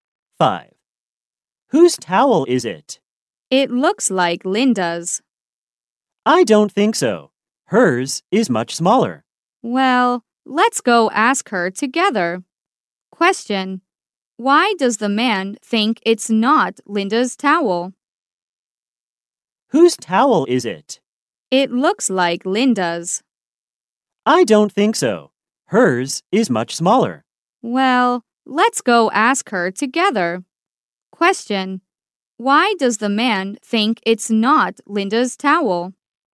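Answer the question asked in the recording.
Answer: Linda's towel is much smaller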